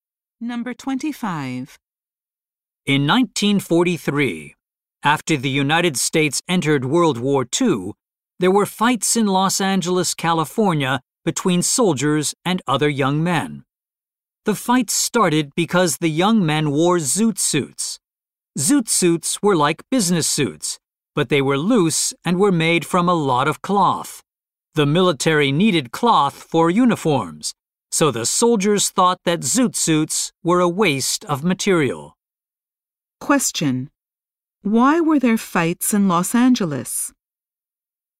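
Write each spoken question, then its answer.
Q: Why were there fights in Los Angeles?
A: Soldiers thought zoot suits wasted cloth needed for uniforms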